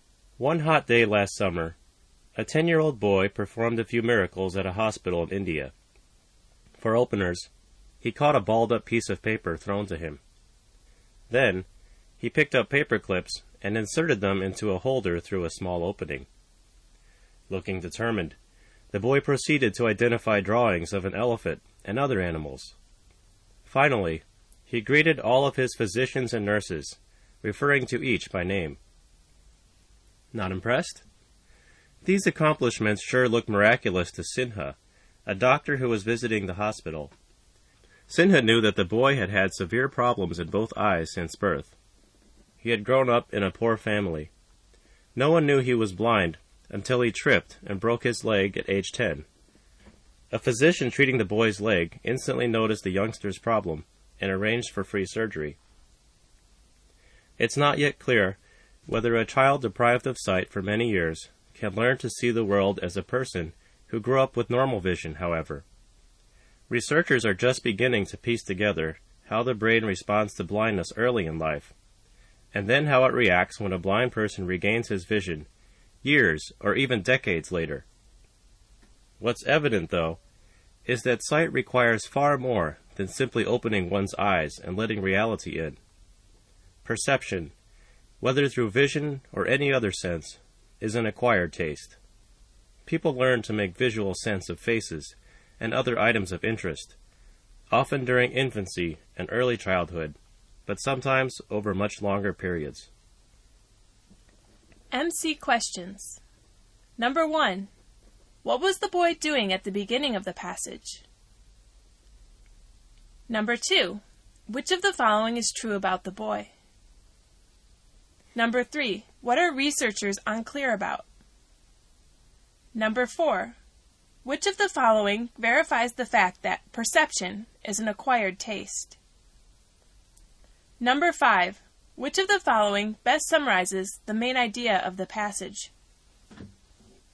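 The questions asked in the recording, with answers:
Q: What was the boy doing at the beginning of the passage?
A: Showing he could see after surgery: catching paper, handling paper clips, naming drawings and his doctors and nurses

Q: What are researchers unclear about?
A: Whether a child deprived of sight for years can learn to see like someone with normal vision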